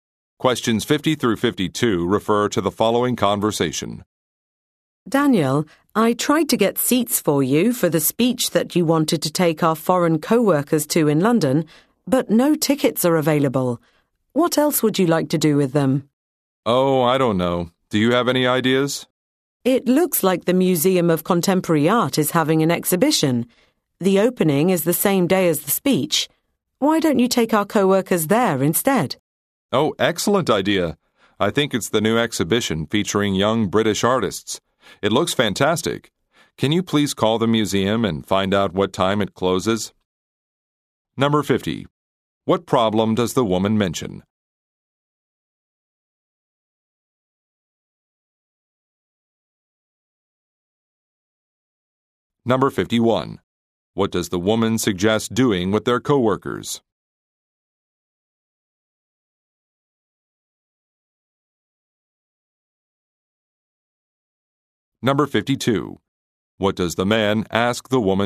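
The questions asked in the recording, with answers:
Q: What problem does the woman mention?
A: No tickets are available for the speech

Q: What does the woman suggest doing with their co-workers?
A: Taking them to the art museum's exhibition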